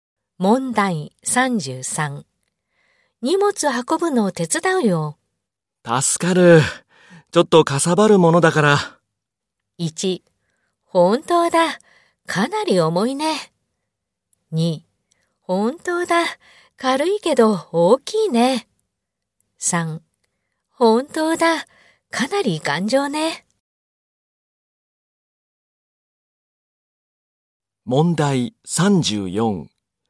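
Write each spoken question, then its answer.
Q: 荷物運ぶのを手伝うよ。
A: 2: 本当だ。軽いけど大きいね。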